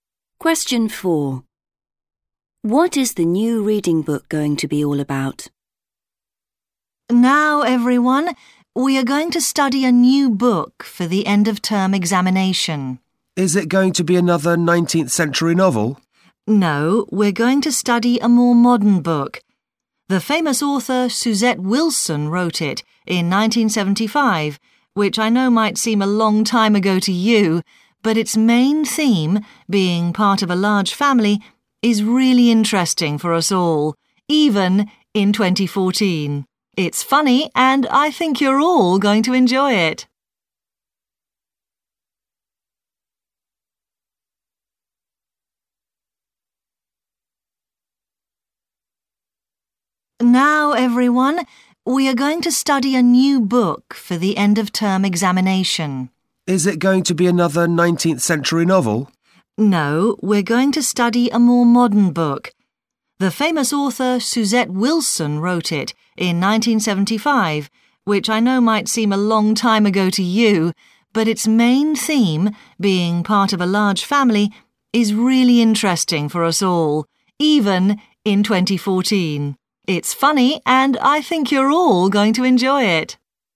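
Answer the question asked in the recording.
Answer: Being part of a large family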